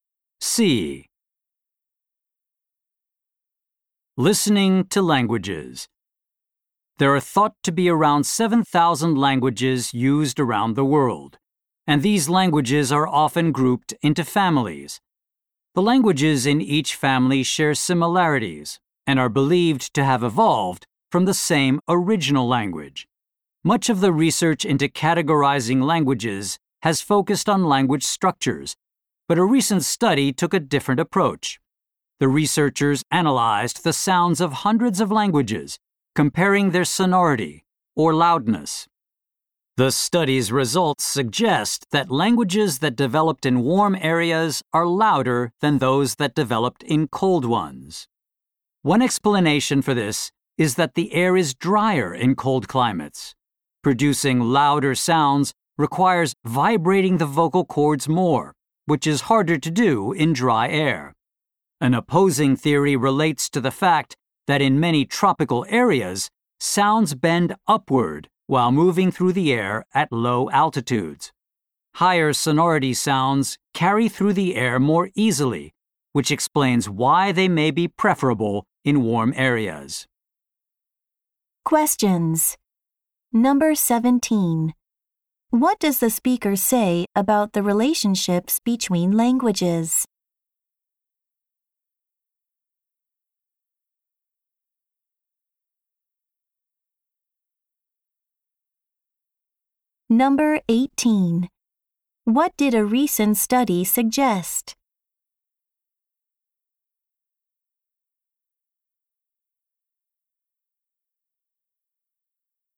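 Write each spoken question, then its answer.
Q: What does the speaker say about the relationships between languages?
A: Languages in a family share similarities and evolved from the same original language.

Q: What did a recent study suggest?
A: Languages from warm areas are louder than those from cold ones.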